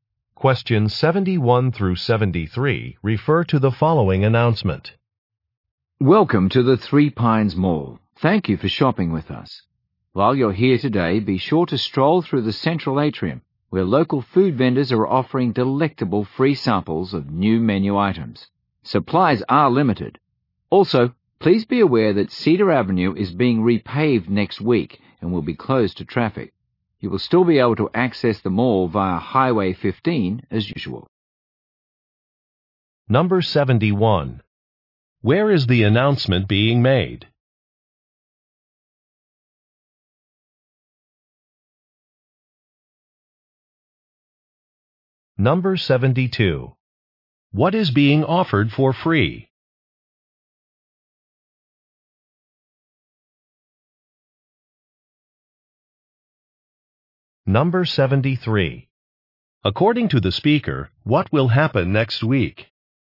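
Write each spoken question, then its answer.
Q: Where is the announcement being made?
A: At the Three Pines Mall

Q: What is being offered for free?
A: Food samples of new menu items

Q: According to the speaker, what will happen next week?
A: Cedar Avenue will be repaved and closed to traffic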